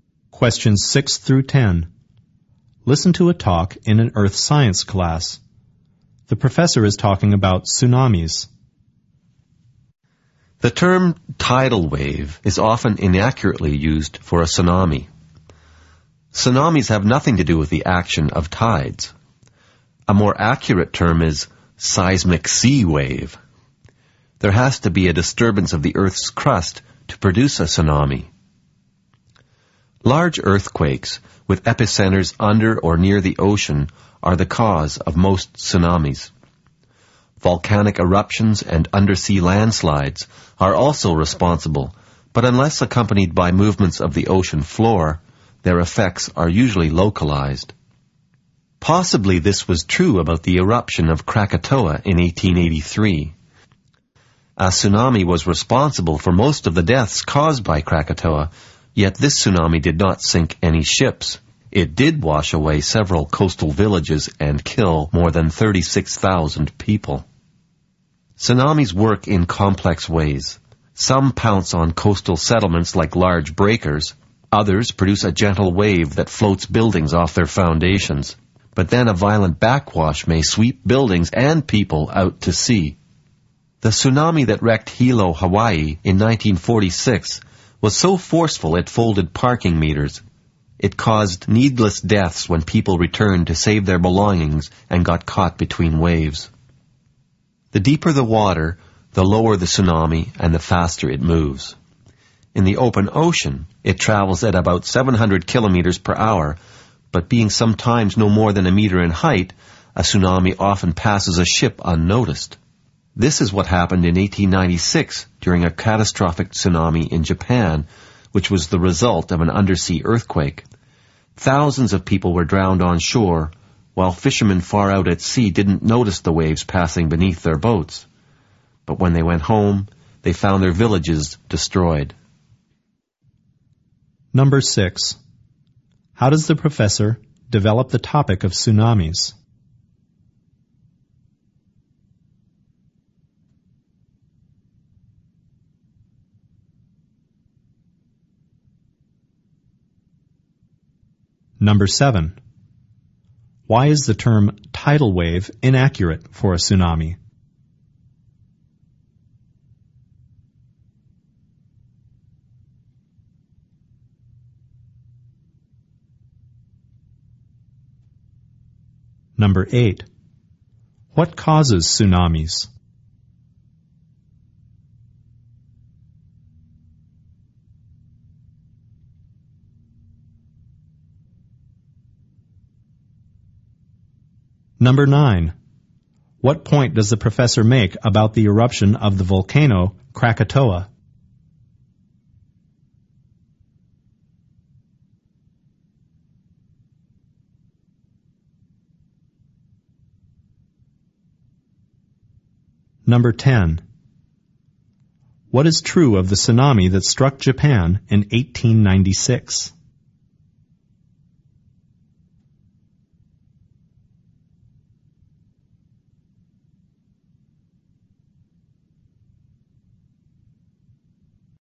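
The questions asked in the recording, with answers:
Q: Why is the term tidal wave inaccurate for a tsunami?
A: Tsunamis have nothing to do with tides

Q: What causes tsunamis?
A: Disturbances of the Earth's crust, mostly large undersea earthquakes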